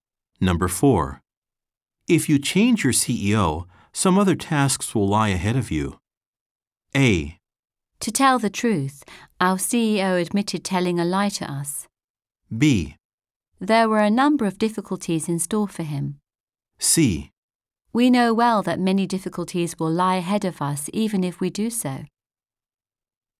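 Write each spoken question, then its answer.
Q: If you change your CEO, some other tasks will lie ahead of you.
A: C: We know well that many difficulties will lie ahead of us even if we do so.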